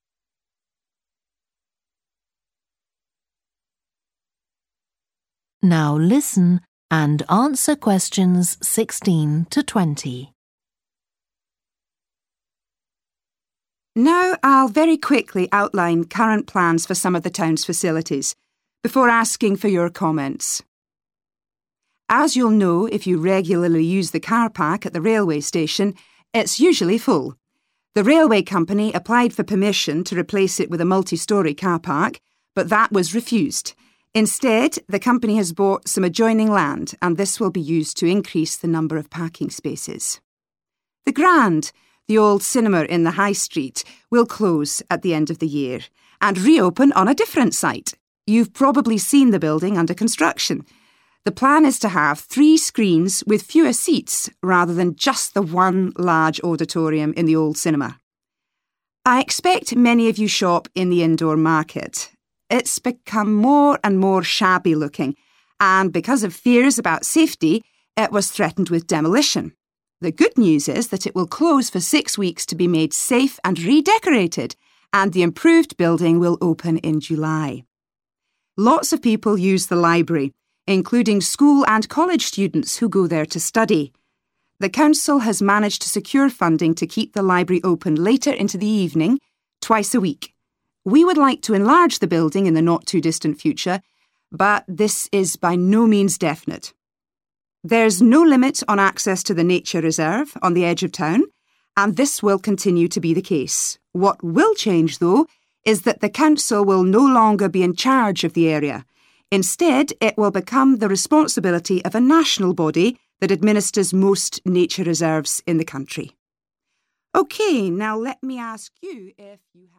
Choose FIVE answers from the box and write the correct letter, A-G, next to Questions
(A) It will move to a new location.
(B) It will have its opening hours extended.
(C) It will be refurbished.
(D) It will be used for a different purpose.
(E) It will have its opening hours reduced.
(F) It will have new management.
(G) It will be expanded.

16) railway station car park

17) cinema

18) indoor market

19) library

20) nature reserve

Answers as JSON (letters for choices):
{"16": "G", "17": "A", "18": "C", "19": "B", "20": "F"}

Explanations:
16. The correct answer is G (It will be expanded) because the excerpt confirms that the company plans to use the acquired land to increase the number of parking spaces, indicating an expansion of the car park facility.
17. The correct answer 'A' matches with the information in the excerpt that the cinema is closing at its current site and reopening at a different location, indicating a move to a new location.
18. The correct answer is 'C' because the excerpt clearly states that the indoor market will undergo renovations and improvements to make it safe and redecorated, aligning with the concept of refurbishment.
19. The correct answer is 'B' because the statement in the excerpt directly mentions that the library will stay open later into the evening, which implies its opening hours will be extended.
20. The correct answer is 'F' because the excerpt mentions that the nature reserve will no longer be managed by the current entity and will instead come under the management of a national body, implying a change in management.

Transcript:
Now I'll very quickly outline current plans for some of the town's facilities, before asking for your comments.
As you'll know if you regularly use the car park at the railway station, it's usually full. The railway company applied for permission to replace it with a multi-storey car park, but that was refused. Instead, the company has bought some adjoining land, and this will be used to increase the number of parking spaces.
The Grand, the old cinema in the high street will close at the end of the year, and reopen on a different site. You've probably seen the building under construction. The plan is to have three screens with fewer seats, rather than just the one large auditorium in the old cinema.
I expect many of you shop in the indoor market. It's become more and more shabby-looking, and because of fears about safety, it was threatened with demolition. The good news is that it will close for sex weeks to be made safe and redecorated, and the improved building will open in July.
Lots of people use the library, including school and college students who go there to study. The council has managed to secure funding to keep the library open later into the evening, twice a week. We would like to enlarge the building in the not-too-distant future, but this is by no means definite.
There's no limit on access to the nature reserve on the edge of town, and this will continue be the case. What will change, though, is that the council will no longer be in charge of the area. Instead it will become the responsibility of a national body that administers most nature reserves in the country.
OK, now let me ask you ...